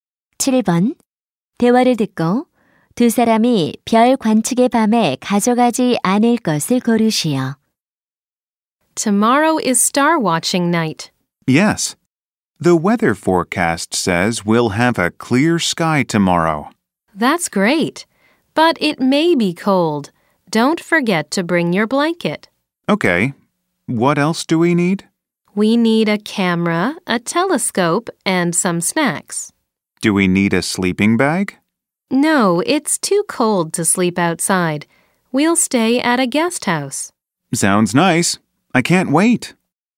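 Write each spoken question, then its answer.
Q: 대화를 듣고 두 사람이 별 관측의 밤에 가져가지 않을 것을 고르시오.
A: 침낭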